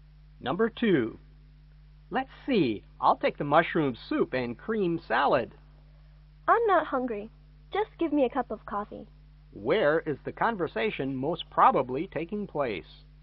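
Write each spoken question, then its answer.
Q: Where is the conversation most probably taking place?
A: In a restaurant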